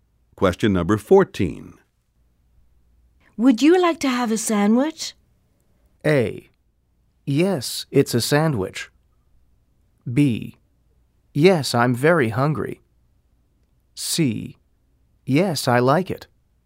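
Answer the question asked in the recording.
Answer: B: Yes, I'm very hungry.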